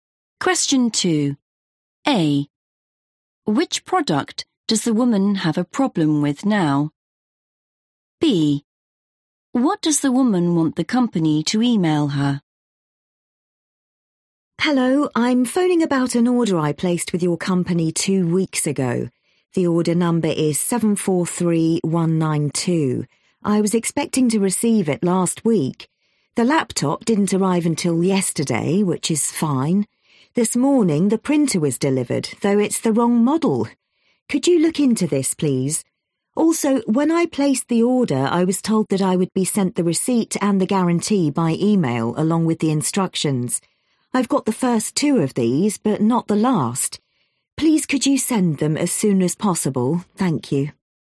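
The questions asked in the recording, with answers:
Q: Which product does the woman have a problem with now?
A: the printer

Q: What does the woman want the company to email her?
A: the instructions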